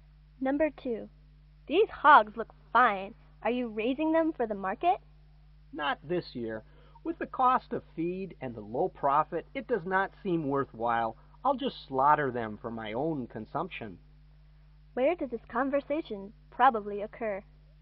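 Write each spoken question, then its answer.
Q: Where did this conversation probably occur?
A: On a farm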